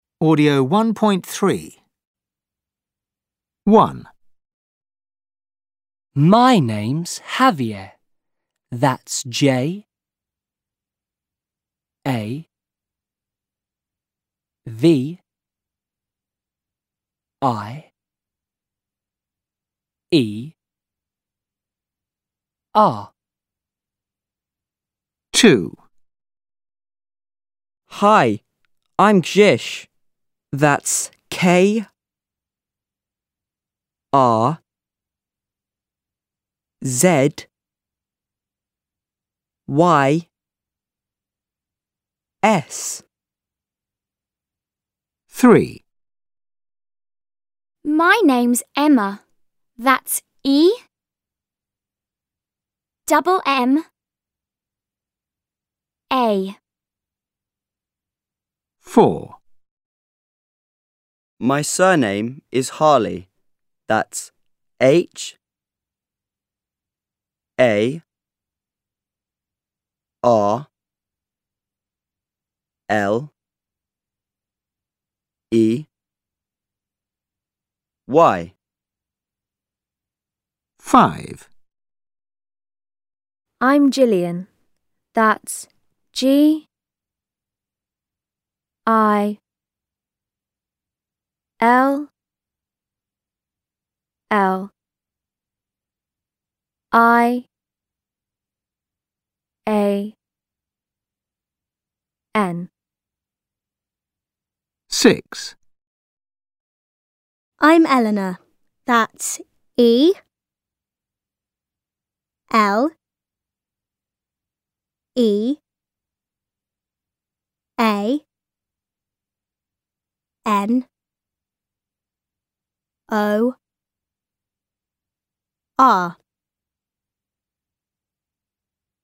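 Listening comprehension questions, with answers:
Listen and write the name.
Listen and write the name.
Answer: Javier, Krzys, Emma, Harley, Gillian, Eleanor

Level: 5 Клас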